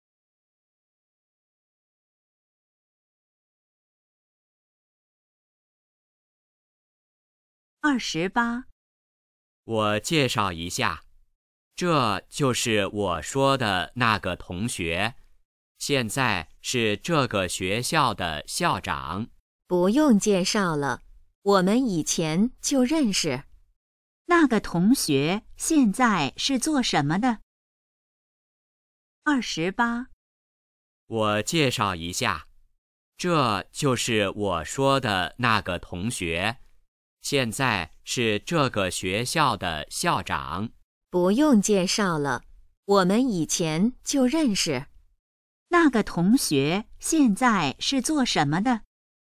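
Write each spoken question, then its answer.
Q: 那个同学现在是做什么的?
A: 校长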